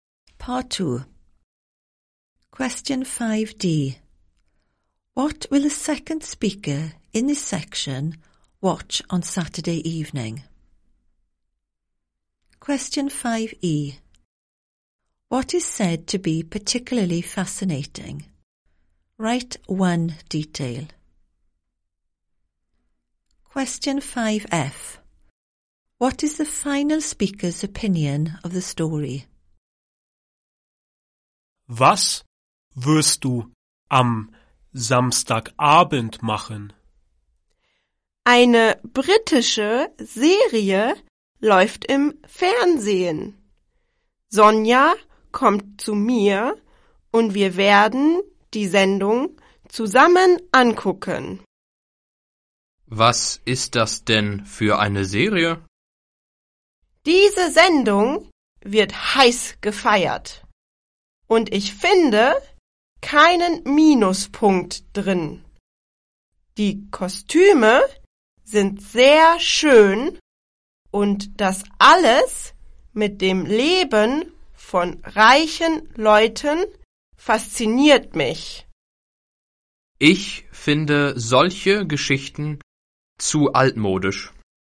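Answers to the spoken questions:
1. A British TV series
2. The costumes / the life of rich people
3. Too old-fashioned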